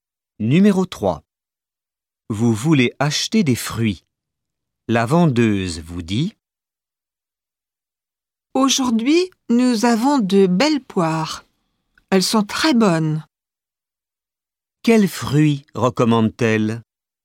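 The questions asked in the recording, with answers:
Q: Quels fruits recommande-t-elle?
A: Des poires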